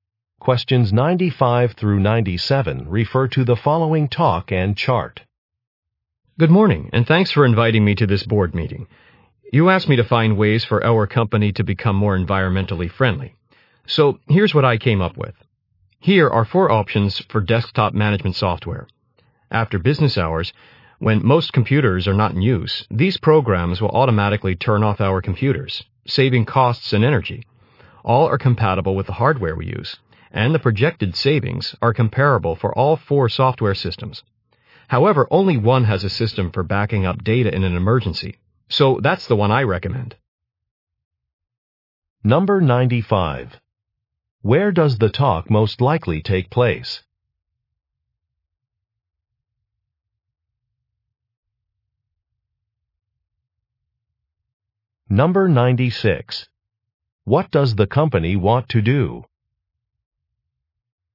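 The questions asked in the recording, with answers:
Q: Where does the talk most likely take place?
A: At a board meeting.

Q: What does the company want to do?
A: Become more environmentally friendly.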